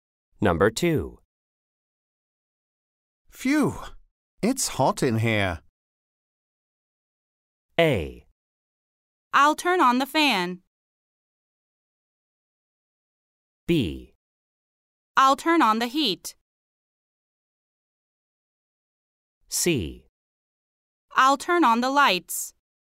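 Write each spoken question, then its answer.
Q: Phew! It's hot in here.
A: A: I'll turn on the fan.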